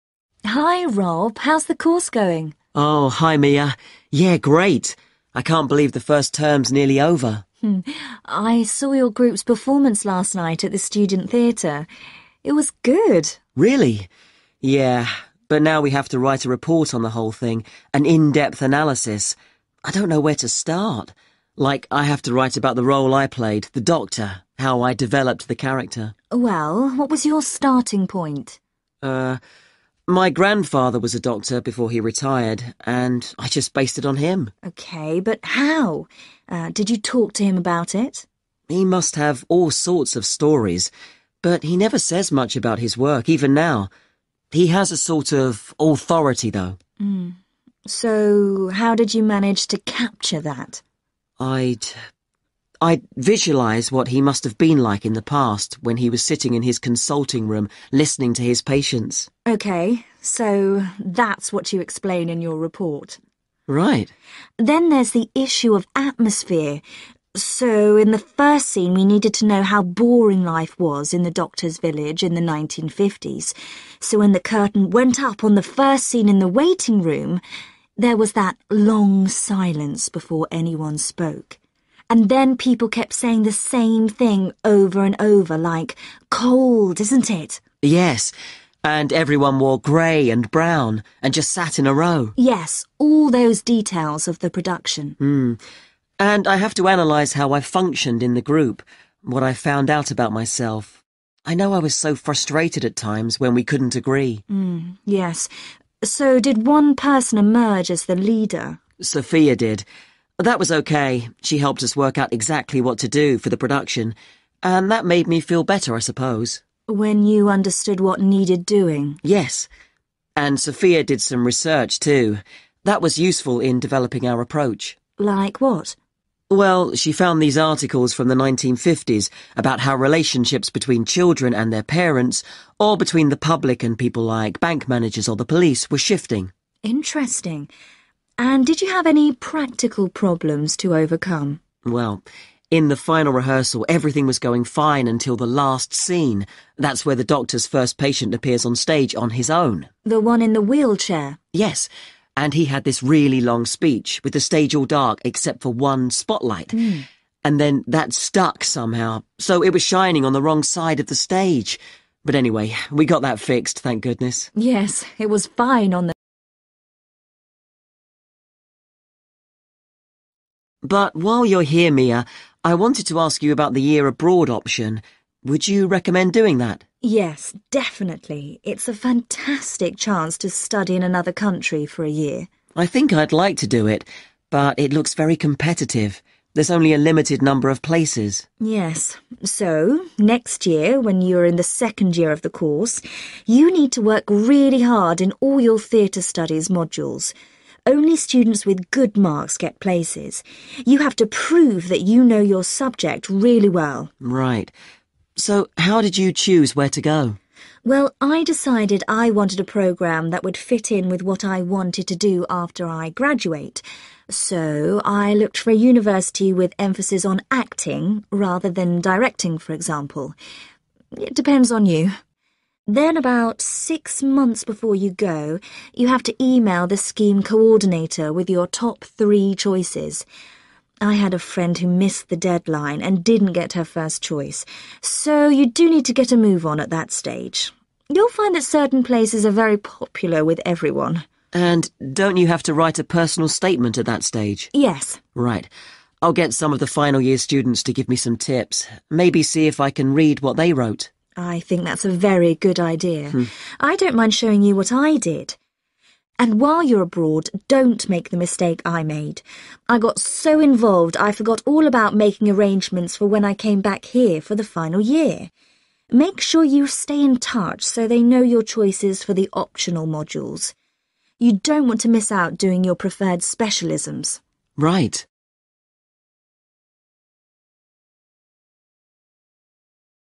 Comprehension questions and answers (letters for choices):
Choose the correct letter, A, B or C.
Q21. What helped Rob to prepare to play the character of a doctor?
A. the stories his grandfather told him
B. the times when he watched his grandfather working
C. the way he imagined his grandfather at work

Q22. In the play's first scene, the boredom of village life was suggested by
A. repetition of words and phrases.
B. scenery painted in dull colours.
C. long pauses within conversations.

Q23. What has Rob learned about himself through working in a group?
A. He likes to have clear guidelines.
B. He copes well with stress.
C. He thinks he is a good leader.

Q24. To support the production, research material was used which described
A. political developments.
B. changing social attitudes.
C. economic transformations.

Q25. What problem did the students overcome in the final rehearsal?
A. one person forgetting their words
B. an equipment failure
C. the injury of one character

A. be on time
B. get a letter of recommendation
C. plan for the final year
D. make sure the institution's focus is relevant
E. show ability in Theatre Studies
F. make travel arrangements and bookings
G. ask for help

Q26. in the second year of the course _______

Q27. when first choosing where to go _______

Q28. when sending in your choices _______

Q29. when writing your personal statement _______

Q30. when doing the year abroad _______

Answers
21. C
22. A
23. A
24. B
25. B
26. E
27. D
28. A
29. G
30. C

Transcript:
MIA: Hi, Rob. How's the course going?
ROB: Oh, hi, Mia. Yeah, great. I can't believe the first term's nearly over.
MIA: I saw your group's performance last night at the student theatre. It was good.
ROB: Really? Yeah ... but now we have to write a report on the whole thing, an in-depth analysis. I don't know where to start. Like, I have to write about the role I played, the doctor, how I developed the character.
MIA: Well, what was your starting point?
my grandfather was a doctor before he retired, and I just based it on him.
MIA: OK, but how? Did you talk to him about it?
ROB: He must have all sorts of stories, but he never says much about his work, even now. He has a sort of authority though.
MIA: So how did you manage to capture that?
ROB: I'd ... I'd visualise what he must have been like in the past, when he was sitting in his consulting room listening to his patients.
MIA: OK, so that's what you explain in your report.
ROB: Right.
MIA: Then there's the issue of atmosphere – so in the first scene we needed to know how boring life was in the doctor's village in the 1950s, so when the curtain went up on the first scene in the waiting room, there was that long silence before anyone spoke. And then people kept saying the same thing over and over, like 'Cold, isn't it?'
ROB: Yes, and everyone wore grey and brown, and just sat in a row.
MIA: Yes, all those details of the production.
ROB: And I have to analyse how I functioned in the group – what I found out about myself. I know I was so frustrated at times, when we couldn't agree.
MIA: Yes. So did one person emerge as the leader?
ROB: Sophia did. That was OK – she helped us work out exactly what to do, for the production. And that made me feel better, I suppose.
MIA: When you understood what needed doing?
ROB: Yes. And Sophia did some research, too. That was useful in developing our approach.
MIA: Like what?
ROB: Well, she found these articles from the 1950s about how relationships between children and their parents, or between the public and people like bank managers or the police were shifting.
MIA: Interesting. And did you have any practical problems to overcome?
ROB: Well, in the final rehearsal everything was going fine until the last scene – what's where the doctor's first patient appears on stage on his own.
MIA: The one in the wheelchair?
ROB: Yes, and he had this really long speech, with the stage all dark except for one spotlight – and then that stuck somehow so it was shining on the wrong side of the stage ... but anyway we got that fixed, thank goodness.
MIA: Yes, it was fine on the night.
ROB: But while you're here, Mia. I wanted to ask you about the year abroad option. Would you recommend doing that?
MIA: Yes, definitely. It's a fantastic chance to study in another country for a year.
ROB: I think I'd like to do it, but it looks very competitive – there's only a limited number of places.
MIA: Yes, so next year when you are in the second year of the course, you need to work really hard in all your theatre studies modules. Only students with good marks get places – you have to prove that you know your subject really well.
ROB: Right. So how did you choose where to go?
MIA: Well, I decided I wanted a programme that would fit in with what I wanted to do after I graduate, so I looked for a university with emphasis on acting rather than directing for example. It depends on you. Then about six months before you go, you have to email the scheme coordinator with your top three choices. I had a friend who missed the deadline and didn't get her first choice, so you do need to get a move on at that stage. You'll find that certain places are very popular with everyone.
ROB: And don't you have to write a personal statement at that stage?
MIA: Yes.
ROB: Right. I'll get some of the final year students to give me some tips ... maybe see if I can read what they wrote.
MIA: I think that's a very good idea. I don't mind showing you what I did. And while you're abroad don't make the mistake I made. I got so involved I forgot all about making arrangements for when I came back here for the final year. Make sure you stay in touch so they know your choices for the optional modules. You don't want to miss out doing your preferred specialisms.
ROB: Right.